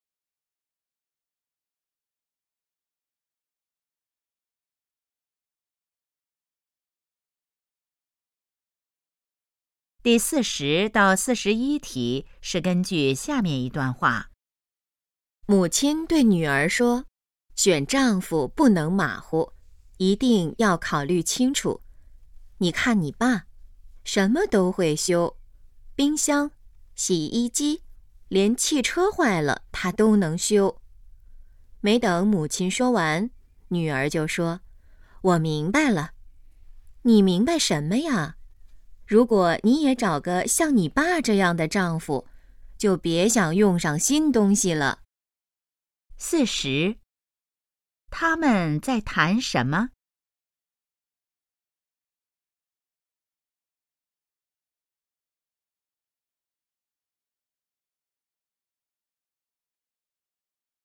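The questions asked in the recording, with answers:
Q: 他们在谈什么?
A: 选丈夫

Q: 关于爸爸,可以知道什么?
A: 什么都会修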